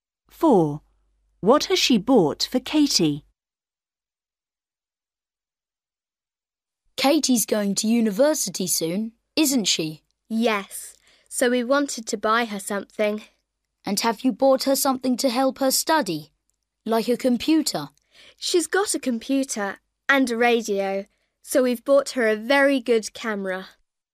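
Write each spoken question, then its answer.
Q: What has she bought for Katie?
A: a camera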